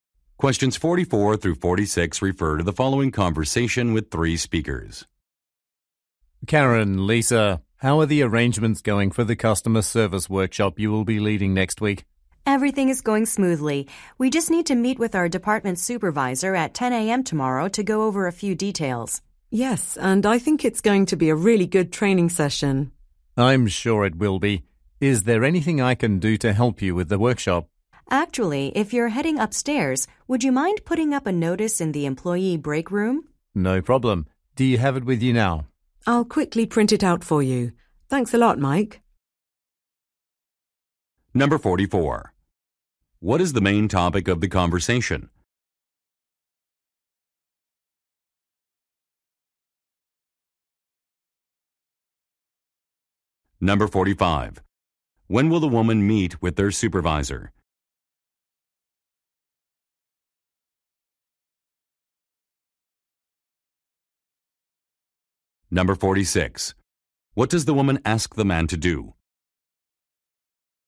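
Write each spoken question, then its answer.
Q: What is the main topic of the conversation?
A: A customer service workshop

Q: When will the woman meet with their supervisor?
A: At 10 a.m. tomorrow

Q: What does the woman ask the man to do?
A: Put up a notice in the employee break room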